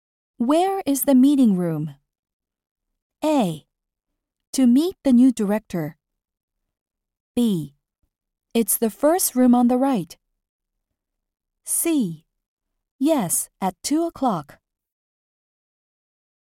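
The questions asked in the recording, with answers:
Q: Where is the meeting room?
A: B: It's the first room on the right.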